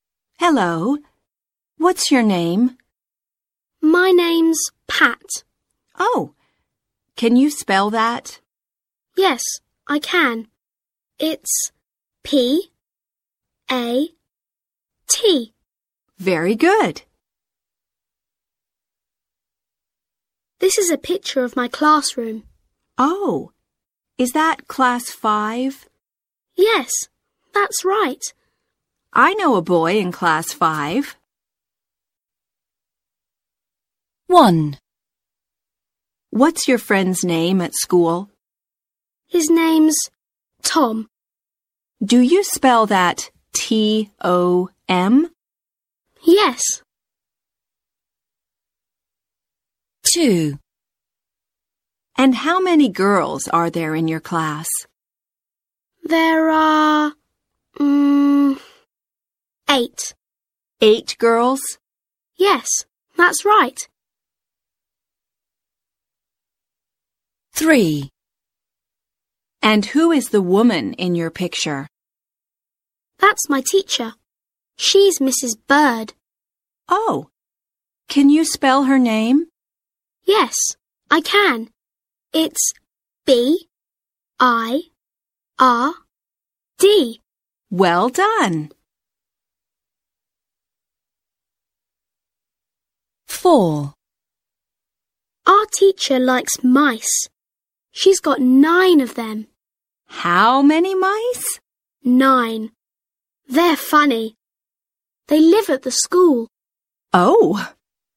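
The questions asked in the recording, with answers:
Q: What's your friend's name at school?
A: Tom

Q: And who is the woman in your picture?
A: Mrs. Bird, the teacher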